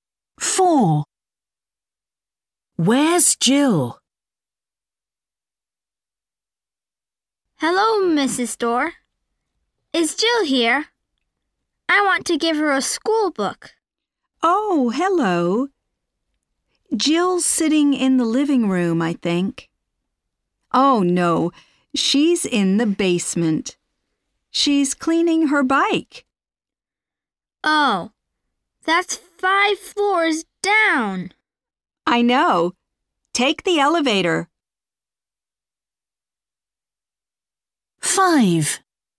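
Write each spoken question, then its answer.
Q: Where's Jill?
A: In the basement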